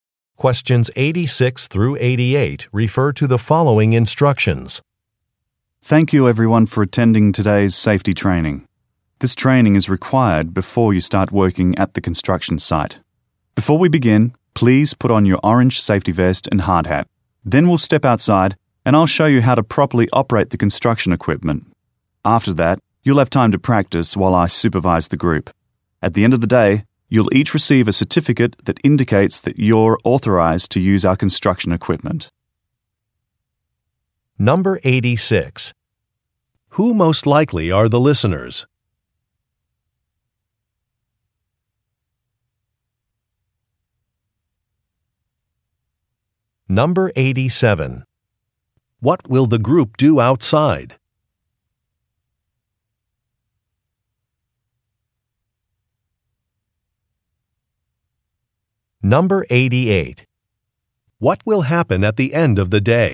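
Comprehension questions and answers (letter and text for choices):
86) Who most likely are the listeners?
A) Construction workers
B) Park rangers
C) Gardeners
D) Architects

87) What will the group do outside?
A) Measure a plot of land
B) Clear some trails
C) Take some photographs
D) Learn about some equipment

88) What will happen at the end of the day?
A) Supplies will be collected.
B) Work schedules will be created.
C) Certificates will be distributed.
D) Books will be ordered.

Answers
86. A) Construction workers
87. D) Learn about some equipment
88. C) Certificates will be distributed.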